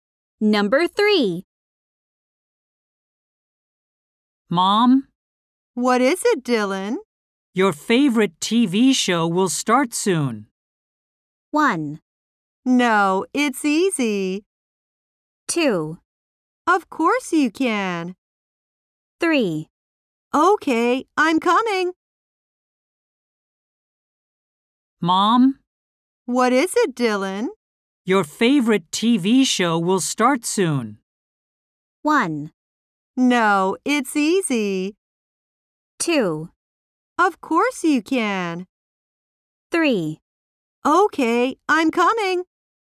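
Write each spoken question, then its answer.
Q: Your favorite TV show will start soon.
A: 3: Okay, I'm coming.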